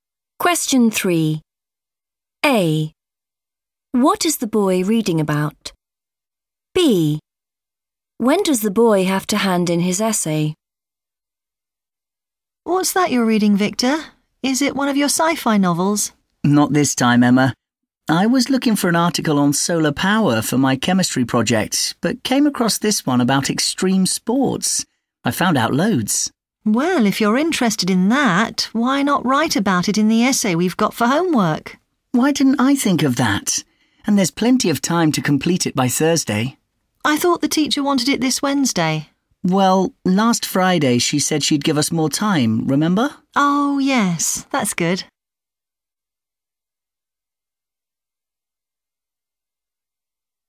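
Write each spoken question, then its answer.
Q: What is the boy reading about?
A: extreme sports

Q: When does the boy have to hand in his essay?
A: Thursday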